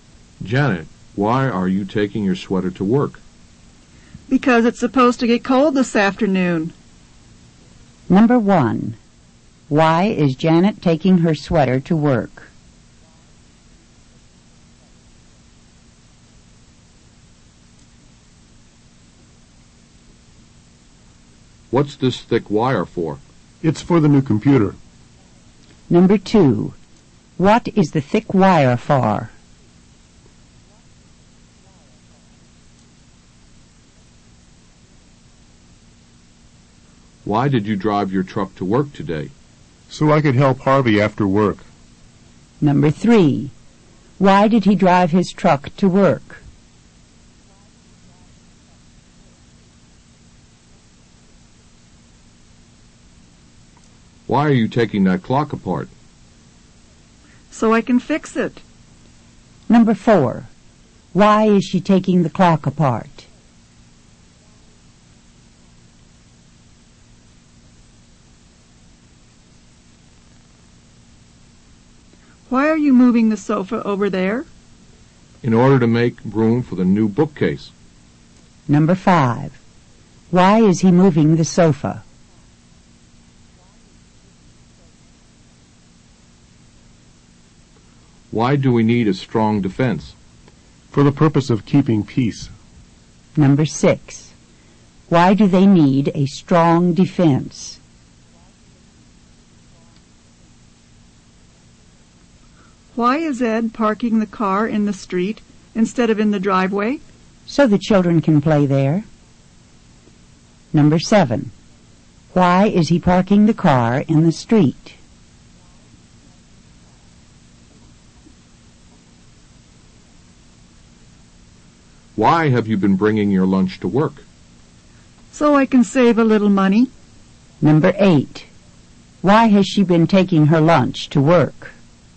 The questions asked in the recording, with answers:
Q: Why is Janet taking her sweater to work?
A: because it's supposed to get cold this afternoon.

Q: What is the thick wire for?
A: It's for the new computer.

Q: Why did he drive his truck to work?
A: so he could help Harvey after work.

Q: Why is she taking the clock apart?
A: So she can fix it.

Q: Why is he moving the sofa?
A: in order to make room for the new bookcase.

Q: Why do they need a strong defense?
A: For the purpose of keeping peace.

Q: Why is he parking the car in the street?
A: So the children can play there.

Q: Why has she been taking her lunch to work?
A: So she can save a little money.